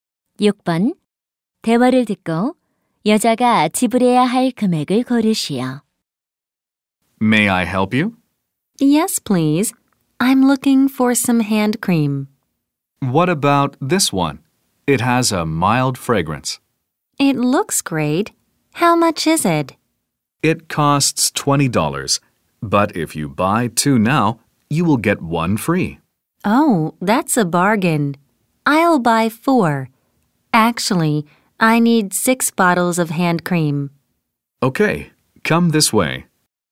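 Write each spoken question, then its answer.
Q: 대화를 듣고 여자가 지불해야 할 금액을 고르시오.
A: 80달러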